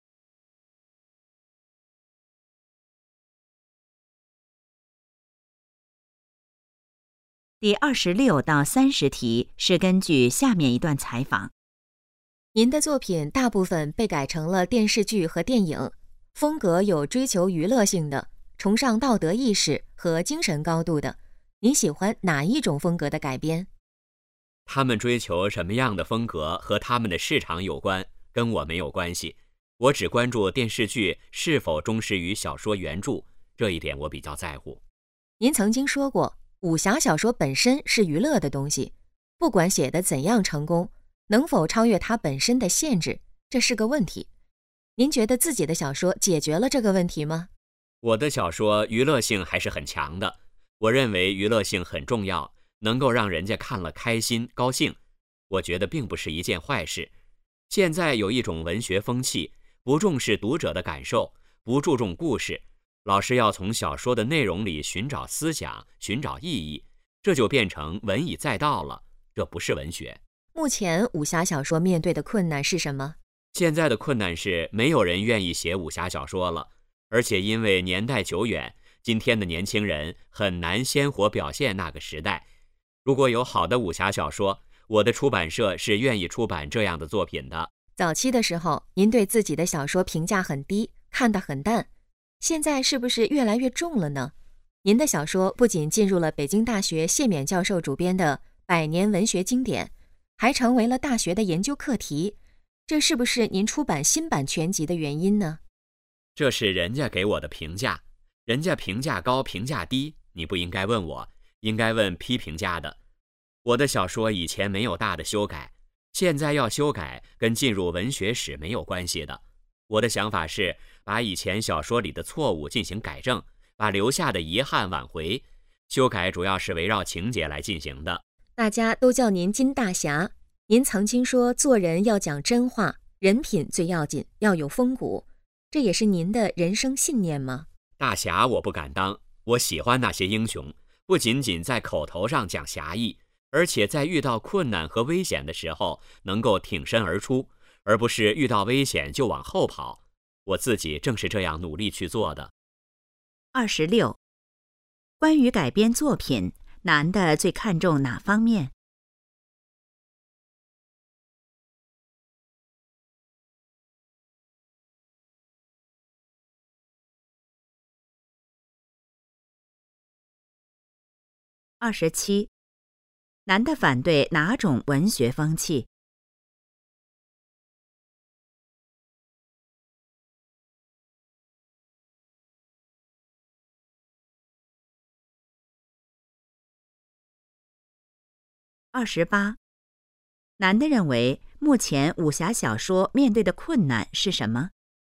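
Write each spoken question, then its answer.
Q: 关于改编作品,男的最看重哪方面?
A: 是否忠实于小说原著

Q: 男的反对哪种文学风气?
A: 不重视读者感受、不注重故事的文以载道风气

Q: 男的认为目前武侠小说面对的困难是什么?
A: 没有人愿意写武侠小说了

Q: 男的为什么要出版新版全集?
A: 改正以前小说里的错误,挽回遗憾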